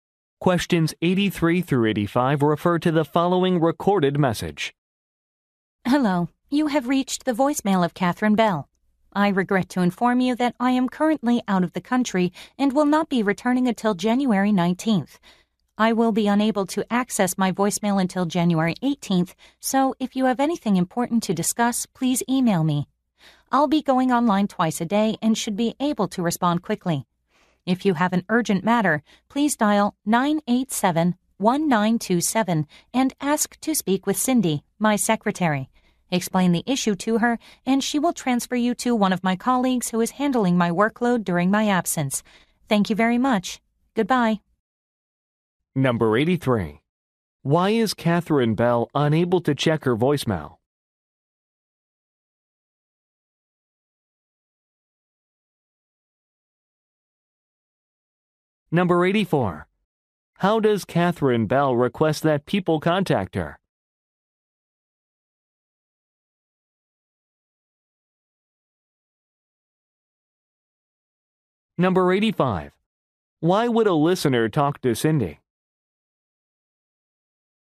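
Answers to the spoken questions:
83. She is out of the country
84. By email
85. To deal with an urgent matter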